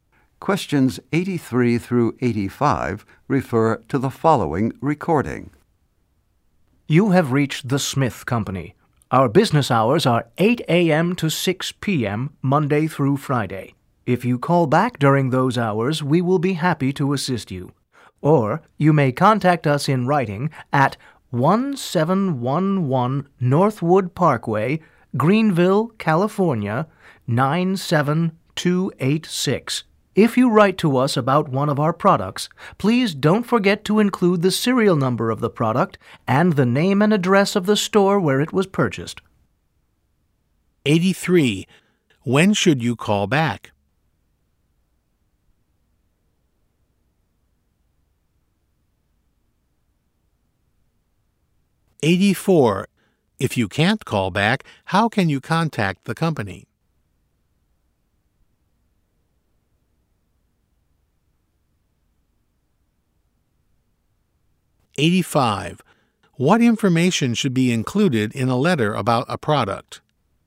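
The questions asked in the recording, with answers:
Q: When should you call back?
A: 8 a.m. to 6 p.m., Monday through Friday

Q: If you can't call back, how can you contact the company?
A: In writing

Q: What information should be included in a letter about a product?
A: The product's serial number and the store's name and address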